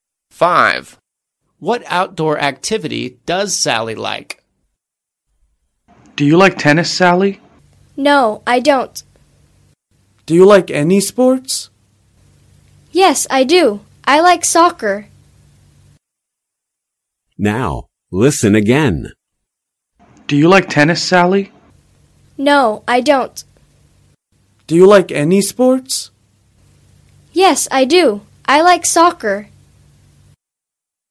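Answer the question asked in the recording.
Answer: soccer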